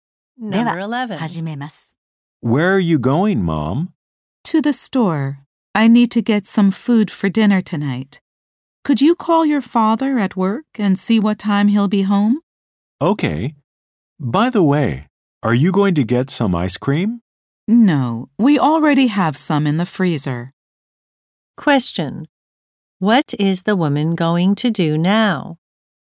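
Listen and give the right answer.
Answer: Go to the store to get food for dinner.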